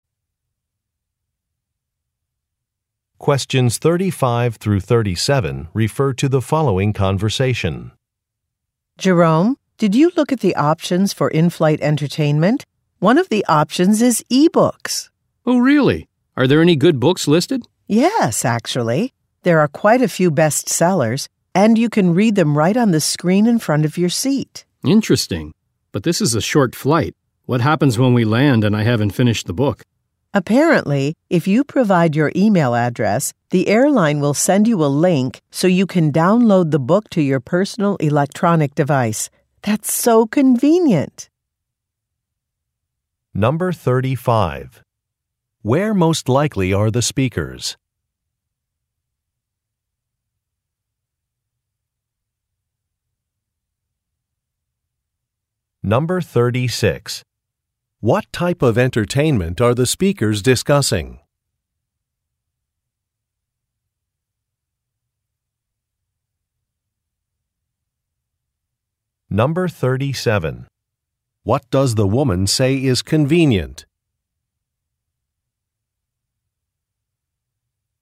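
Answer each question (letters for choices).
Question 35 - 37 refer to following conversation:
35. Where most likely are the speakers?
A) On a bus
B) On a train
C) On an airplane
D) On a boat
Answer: C

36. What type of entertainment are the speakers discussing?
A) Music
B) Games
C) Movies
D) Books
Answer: D

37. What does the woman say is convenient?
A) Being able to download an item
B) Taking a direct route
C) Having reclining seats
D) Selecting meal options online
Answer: A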